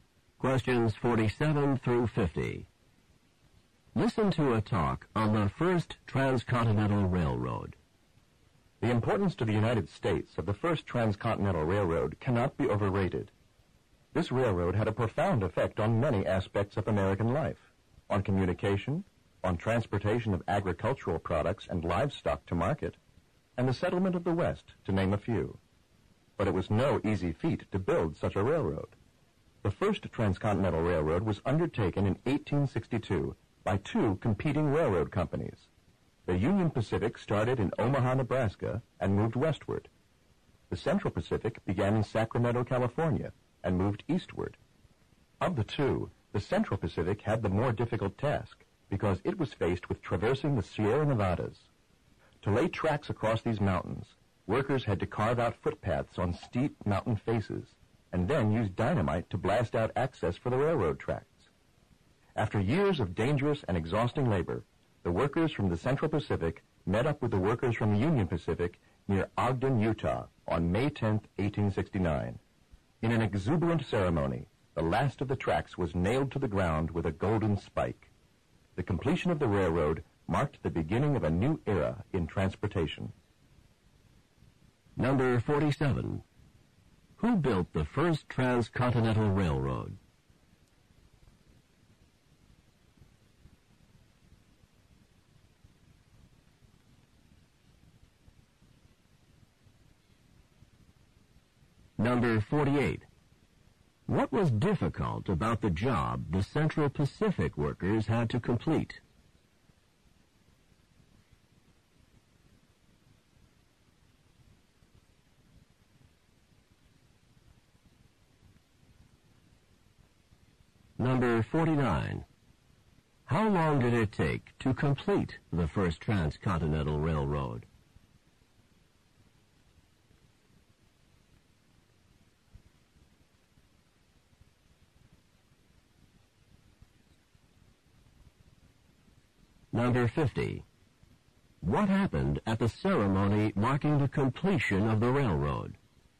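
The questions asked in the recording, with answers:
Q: Who built the first transcontinental railroad?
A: Two competing companies: the Union Pacific and the Central Pacific

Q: What was difficult about the job the Central Pacific workers had to complete?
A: They had to cross the Sierra Nevada mountains

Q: How long did it take to complete the first transcontinental railroad?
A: About seven years (1862–1869)

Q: What happened at the ceremony marking the completion of the railroad?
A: The last track was nailed down with a golden spike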